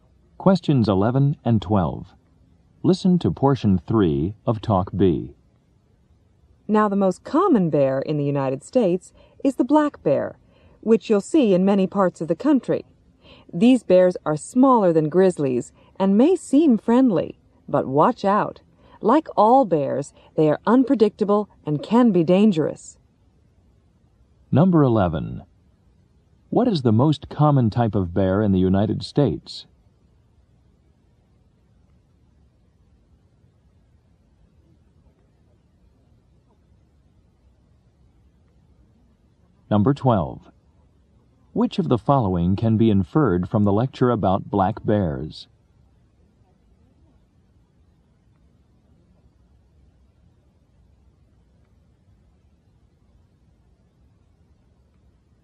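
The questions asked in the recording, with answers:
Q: What is the most common type of bear in the United States?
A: The black bear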